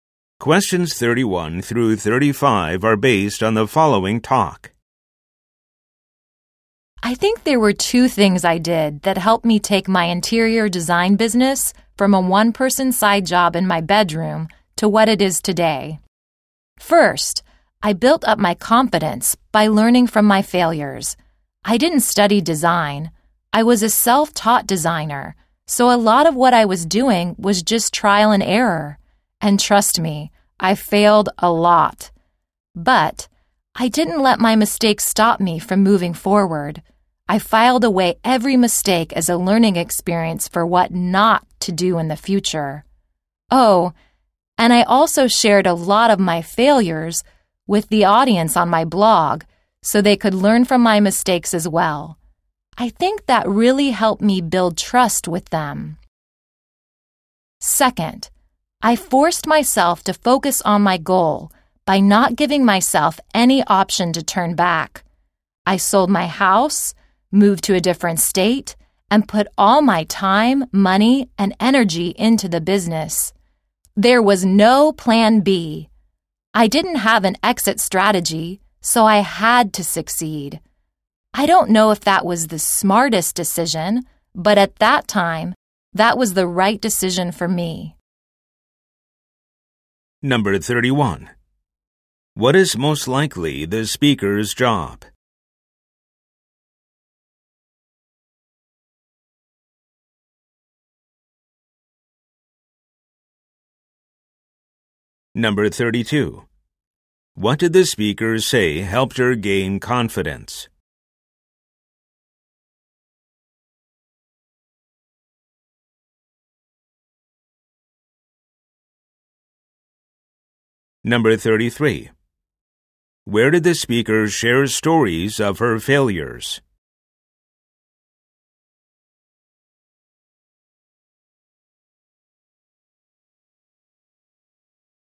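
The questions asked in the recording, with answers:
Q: What is most likely the speaker's job?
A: Interior designer

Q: What did the speaker say helped her gain confidence?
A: Learning from her failures

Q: Where did the speaker share stories of her failures?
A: On her blog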